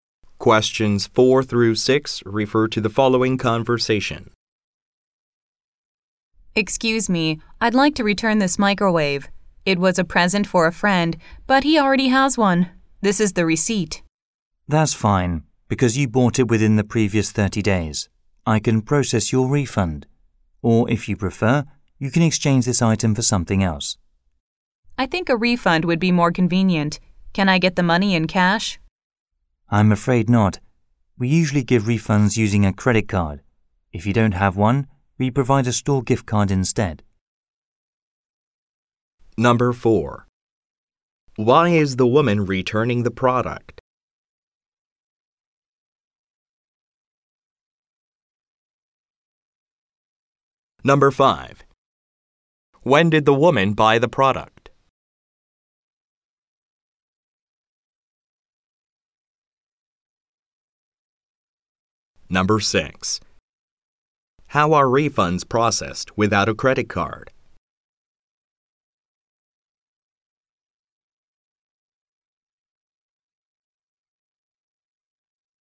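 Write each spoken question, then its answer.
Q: Why is the woman returning the product?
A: Her friend already has one

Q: When did the woman buy the product?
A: Within the previous 30 days

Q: How are refunds processed without a credit card?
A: With a store gift card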